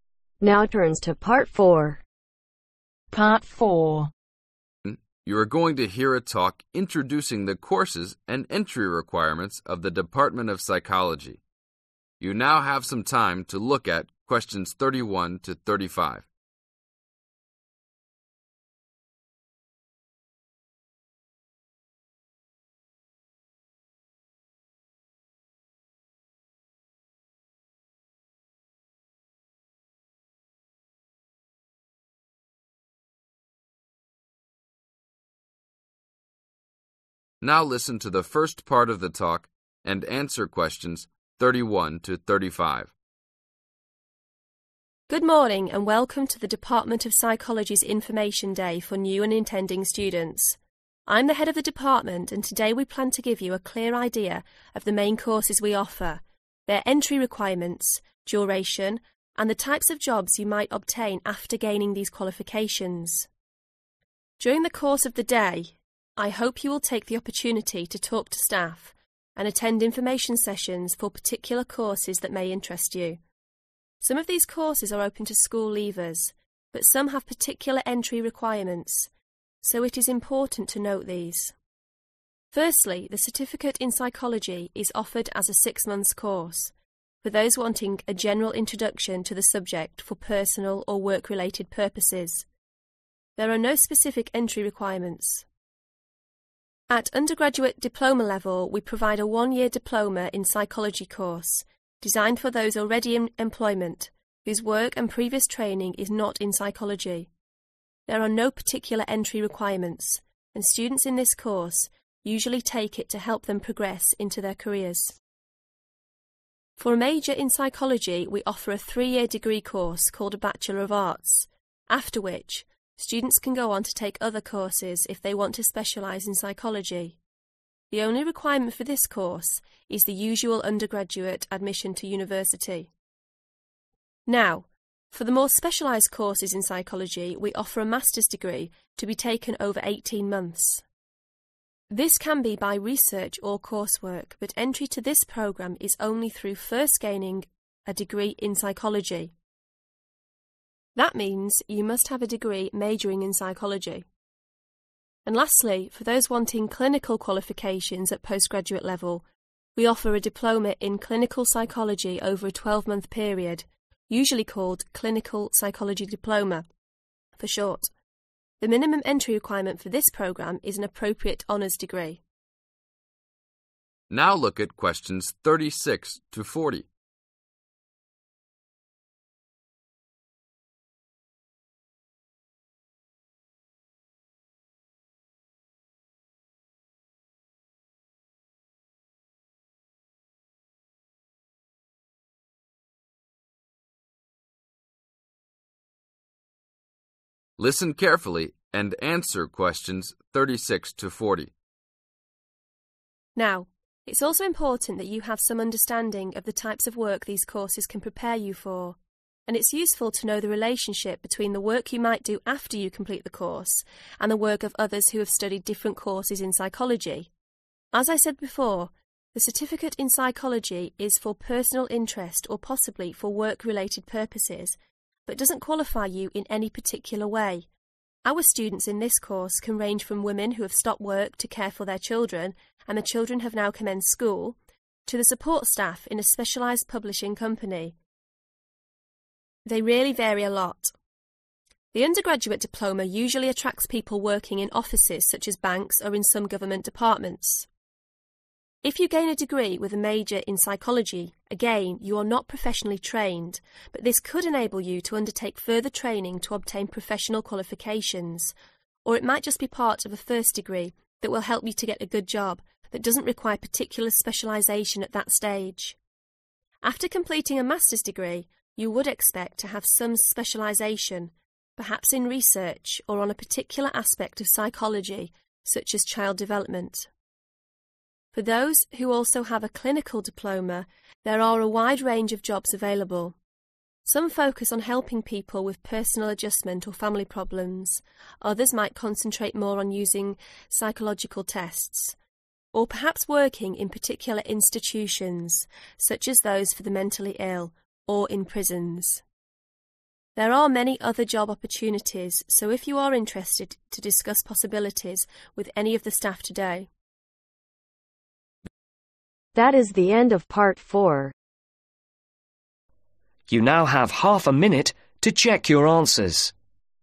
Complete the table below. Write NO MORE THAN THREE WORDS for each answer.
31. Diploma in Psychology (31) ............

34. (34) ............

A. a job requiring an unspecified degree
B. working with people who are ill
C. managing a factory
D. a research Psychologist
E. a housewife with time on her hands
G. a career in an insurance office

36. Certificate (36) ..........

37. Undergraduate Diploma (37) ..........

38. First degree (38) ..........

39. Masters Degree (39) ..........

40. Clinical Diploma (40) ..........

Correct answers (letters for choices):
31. 1 year/one year
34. Degree in psychology
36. E
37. G
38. A
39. D
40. B